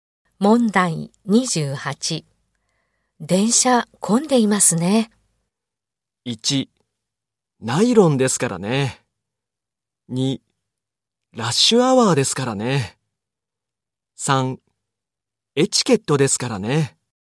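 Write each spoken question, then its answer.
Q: 電車混んでいますね。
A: 2: ラッシュアワーですからね。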